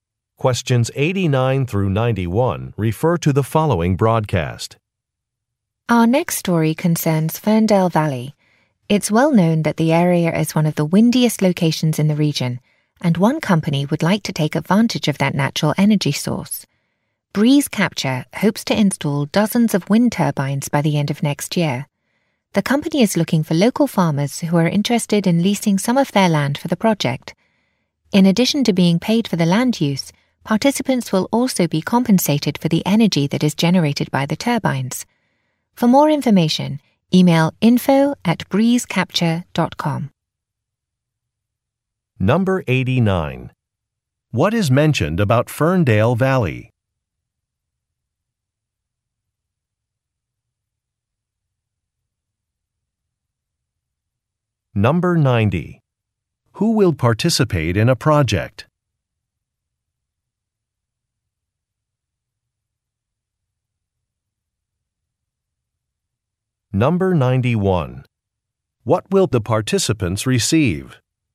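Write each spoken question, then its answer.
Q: What is mentioned about Ferndale Valley?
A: It is one of the windiest locations in the region.

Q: Who will participate in a project?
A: Local farmers.

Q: What will the participants receive?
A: Payment for land use and for energy generated.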